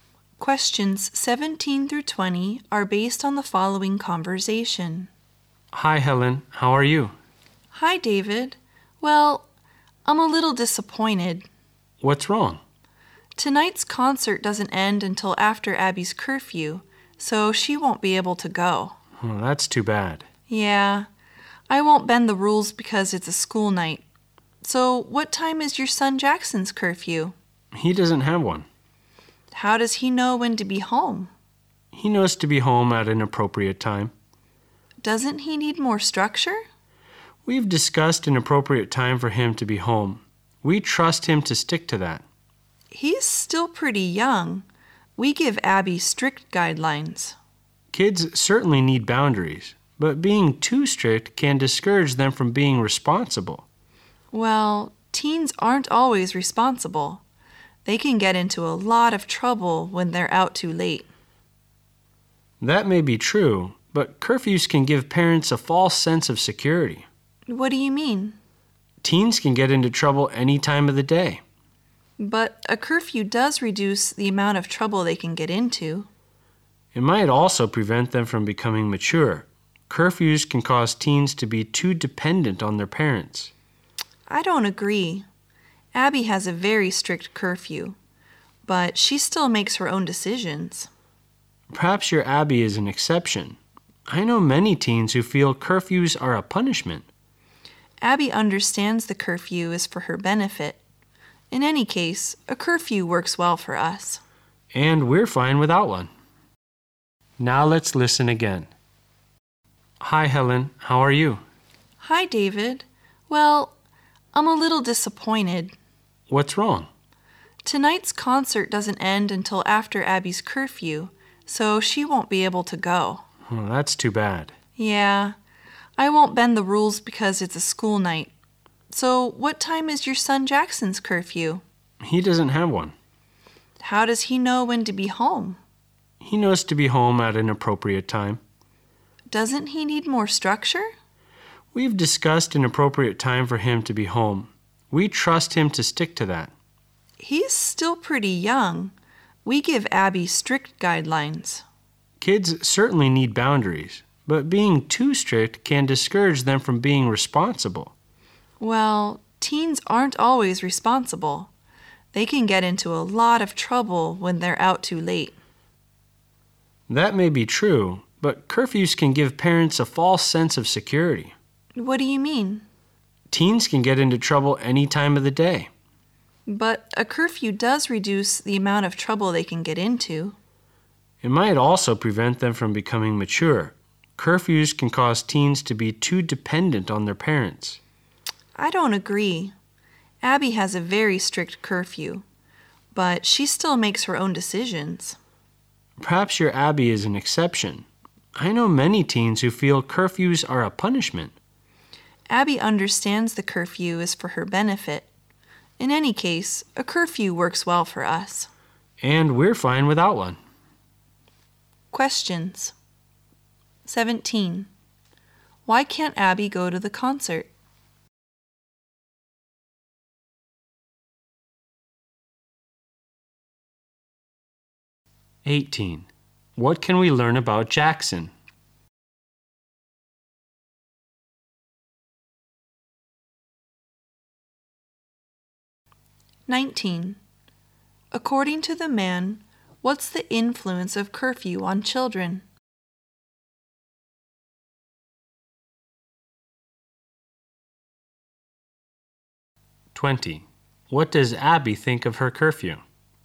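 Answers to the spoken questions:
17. The concert ends after her curfew
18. He has no curfew; his parents trust him to be home at an appropriate time
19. It may stop them from becoming mature and make them too dependent on their parents
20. It is for her benefit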